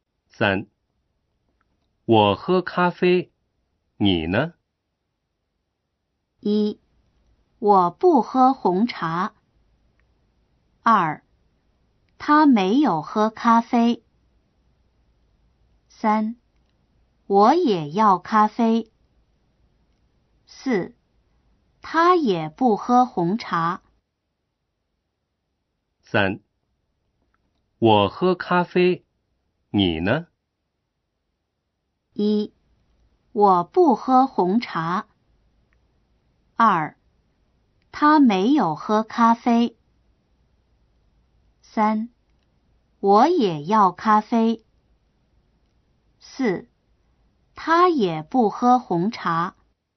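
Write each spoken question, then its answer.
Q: 我喝咖啡,你呢?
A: 3: 我也要咖啡。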